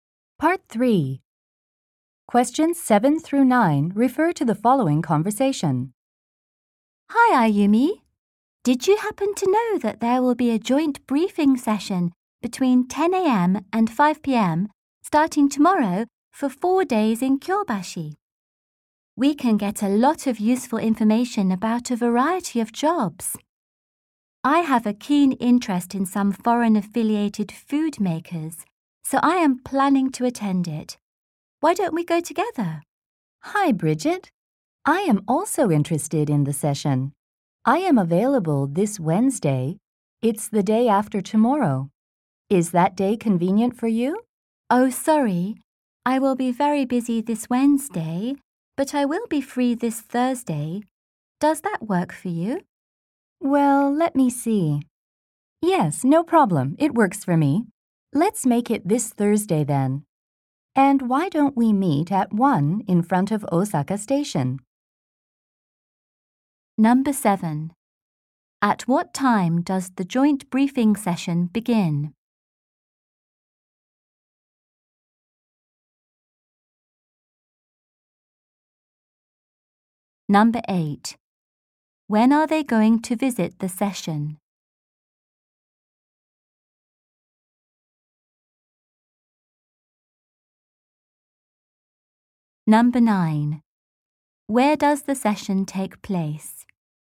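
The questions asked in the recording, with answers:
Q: At what time does the joint briefing session begin?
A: 10 a.m.

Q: When are they going to visit the session?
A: This Thursday

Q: Where does the session take place?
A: In Kyobashi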